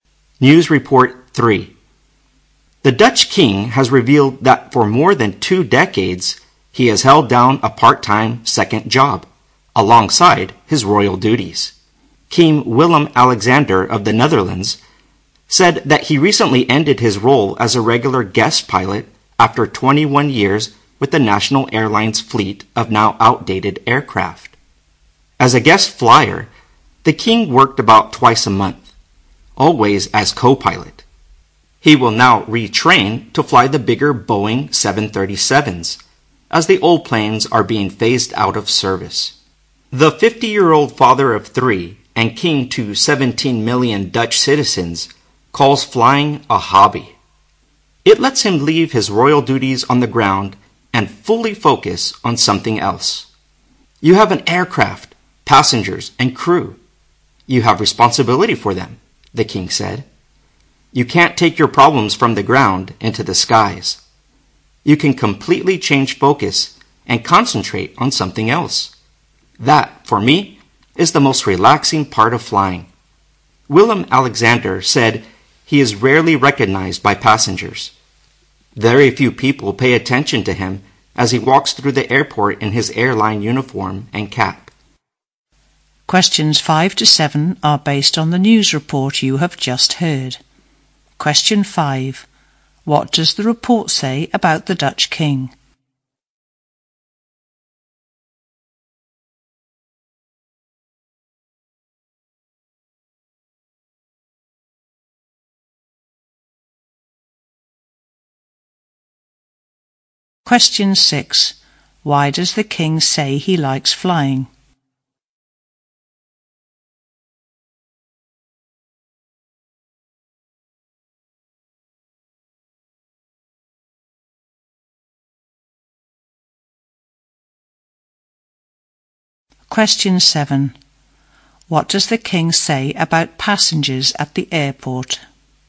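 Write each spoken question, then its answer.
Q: What does the report say about the Dutch king?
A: He secretly worked part-time as an airline co-pilot for 21 years.

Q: Why does the king say he likes flying?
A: It lets him forget his royal duties and focus fully on something else; it is relaxing.

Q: What does the king say about passengers at the airport?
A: They rarely recognize him.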